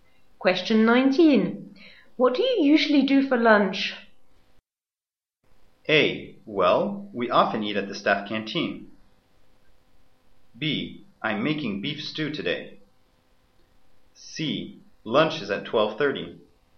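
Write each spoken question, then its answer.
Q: What do you usually do for lunch?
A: A: Well, we often eat at the staff canteen.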